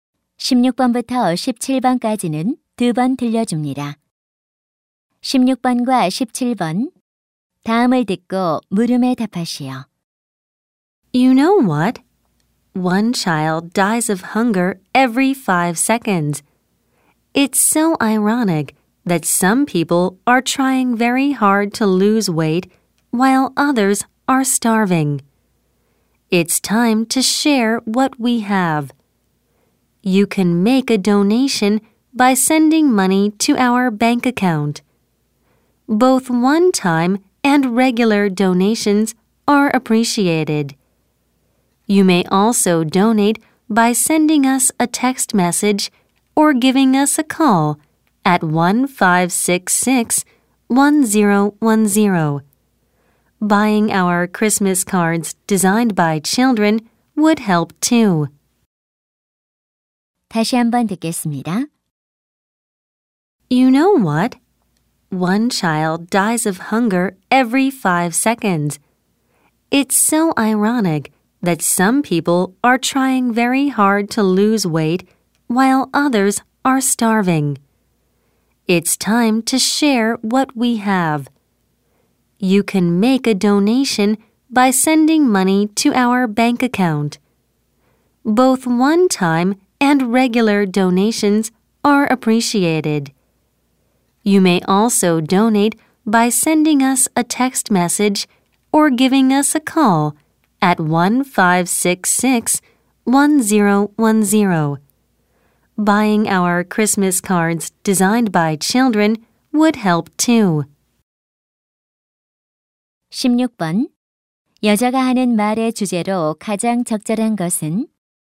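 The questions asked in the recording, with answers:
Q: 여자가 하는 말의 주제로 가장 적절한 것은?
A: 굶주리는 아이들을 위한 기부 방법 안내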